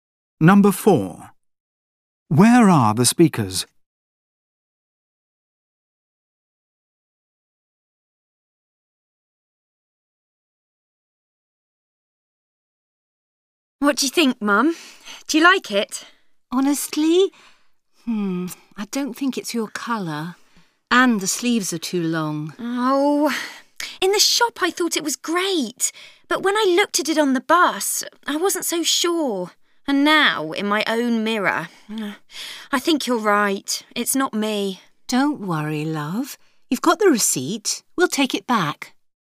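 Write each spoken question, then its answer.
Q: Where are the speakers?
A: At home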